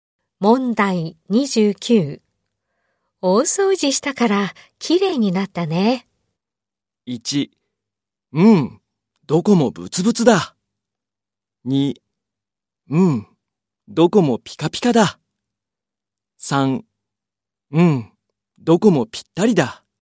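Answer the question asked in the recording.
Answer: 2: うん、どこもピカピカだ。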